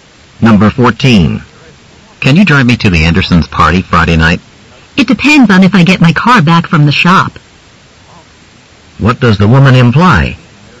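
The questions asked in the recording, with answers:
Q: What does the woman imply?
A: Her car is being repaired, so she may not be able to drive him.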